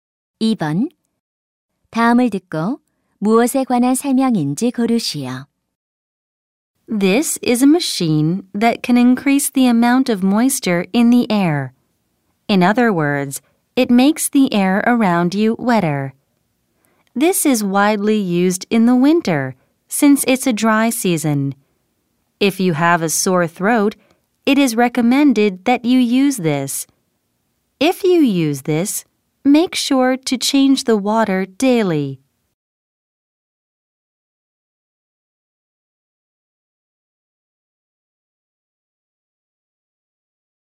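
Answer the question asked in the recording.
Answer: 가습기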